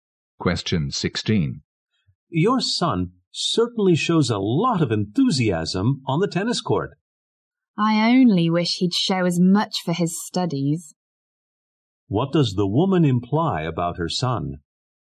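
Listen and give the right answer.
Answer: He is not very interested in his studies.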